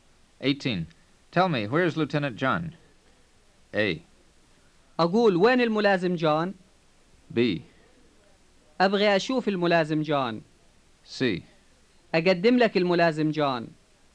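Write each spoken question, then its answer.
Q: Tell me, where is Lieutenant John?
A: A: أقول وين الملازم جون؟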